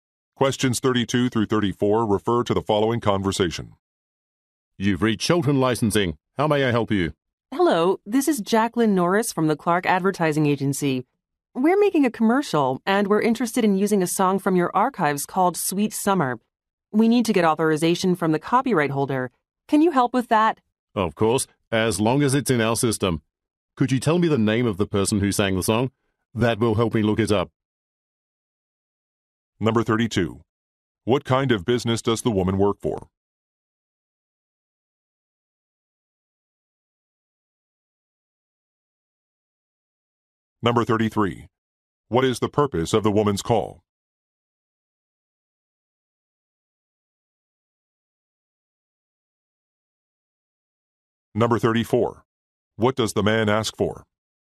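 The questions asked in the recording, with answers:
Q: What kind of business does the woman work for?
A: An advertising agency

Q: What is the purpose of the woman's call?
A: To get authorization to use a song in a commercial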